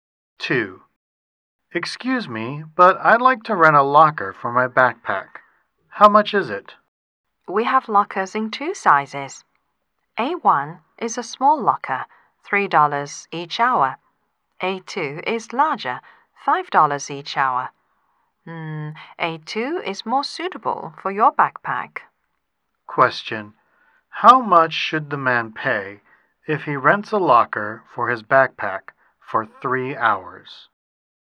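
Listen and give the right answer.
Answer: $15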